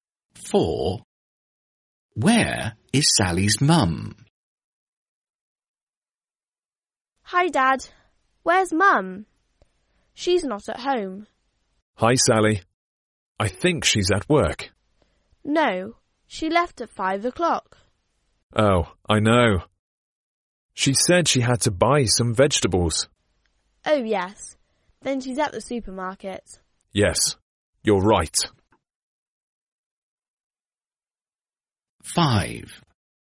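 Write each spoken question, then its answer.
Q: Where is Sally's mum?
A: At the supermarket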